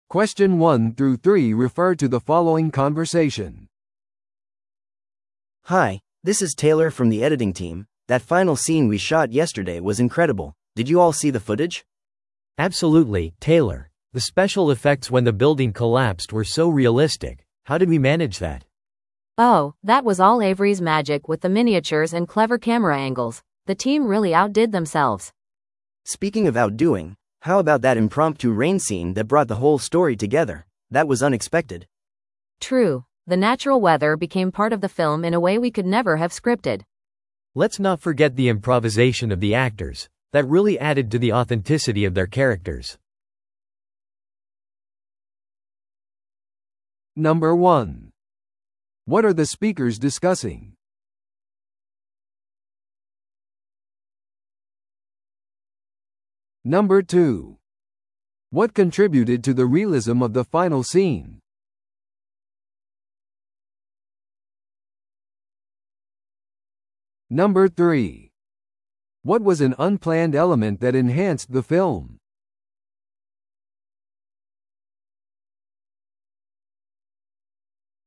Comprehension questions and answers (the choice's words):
Listen to the audio below and answer the questions.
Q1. What are the speakers discussing?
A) ドキュメンタリーの編集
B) シーンの特殊効果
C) 映画のキャスティング決定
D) 脚本の改訂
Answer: シーンの特殊効果

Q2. What contributed to the realism of the final scene?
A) コンピュータ生成の画像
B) エイブリーのミニチュアとカメラワークの使用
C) 新しい監督の雇用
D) ロケでの撮影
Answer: エイブリーのミニチュアとカメラワークの使用

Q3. What was an unplanned element that enhanced the film?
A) 革新的な脚本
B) 突然の天候変化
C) 台詞の書き直し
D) 空撮のためのドローンの使用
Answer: 突然の天候変化

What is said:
A: Hi, this is Taylor from the editing team. That final scene we shot yesterday was incredible. Did you all see the footage?
B: Absolutely, Taylor. The special effects when the building collapsed were so realistic! How did we manage that?
C: Oh, that was all Avery's magic with the miniatures and clever camera angles. The team really outdid themselves.
A: Speaking of outdoing, how about that impromptu rain scene that brought the whole story together? That was unexpected.
C: True! The natural weather became part of the film in a way we could never have scripted.
B: Let's not forget the improvisation of the actors. That really added to the authenticity of their characters.